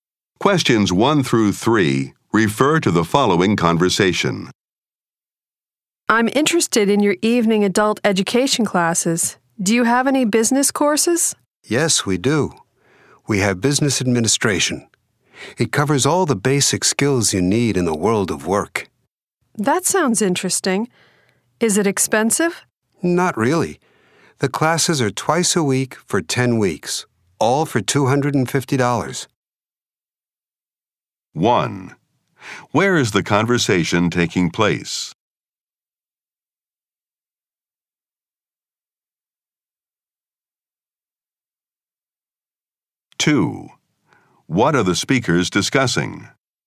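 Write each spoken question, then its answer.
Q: Where is the conversation taking place?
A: At an adult education school

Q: What are the speakers discussing?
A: An evening business administration course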